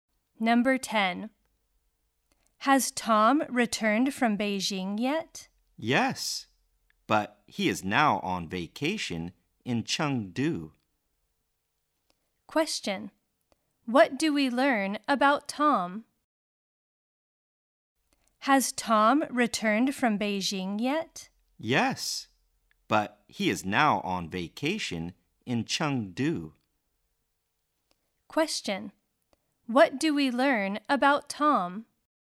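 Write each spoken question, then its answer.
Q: What do we learn about Tom?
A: He has returned from Beijing and is now on vacation in Chengdu.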